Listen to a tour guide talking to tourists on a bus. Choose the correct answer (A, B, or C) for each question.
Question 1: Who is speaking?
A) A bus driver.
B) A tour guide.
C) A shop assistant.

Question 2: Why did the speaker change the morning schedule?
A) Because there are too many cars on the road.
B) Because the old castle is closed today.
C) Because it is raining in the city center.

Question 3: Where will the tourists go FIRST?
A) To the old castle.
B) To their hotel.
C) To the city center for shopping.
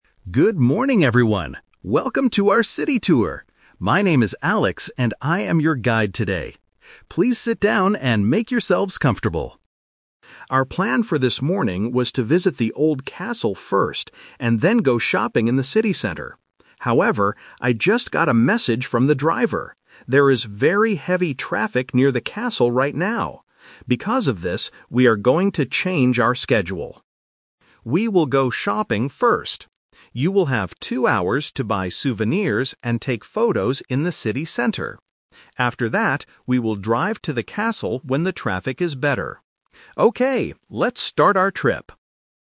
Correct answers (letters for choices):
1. B
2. A
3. C

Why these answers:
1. The speaker says, "My name is Alex, and I am your guide today." Option (A) is a trap; the driver is mentioned ("I just got a message from the driver"), but the driver is not the one speaking. Option (C) is a trap related to the word "shopping".
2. The guide says there is "very heavy traffic near the castle right now." Option (A) uses "too many cars" to paraphrase heavy traffic. Option (B) is a common real-life reason, but not mentioned here. Option (C) is not mentioned.
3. This is The Twist. The original plan was to visit the castle first, but because of the traffic, the guide says, "We will go shopping first." Option (A) is the trap (the old plan). Option (B) is not mentioned.

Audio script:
Guide: Good morning, everyone! Welcome to our city tour. My name is Alex, and I am your guide today. Please sit down and make yourselves comfortable.
Our plan for this morning was to visit the old castle first, and then go shopping in the city center. However, I just got a message from the driver. There is very heavy traffic near the castle right now. Because of this, we are going to change our schedule.
We will go shopping first. You will have two hours to buy souvenirs and take photos in the city center. After that, we will drive to the castle when the traffic is better. Okay, let's start our trip!

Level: A2